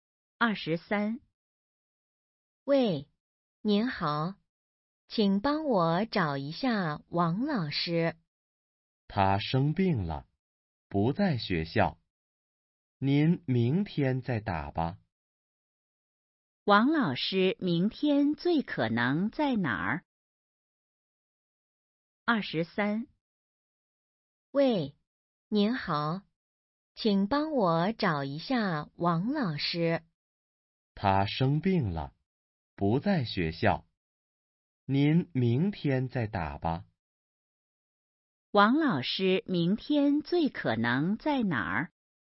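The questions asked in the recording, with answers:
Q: 王老师明天最可能在哪儿?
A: 学校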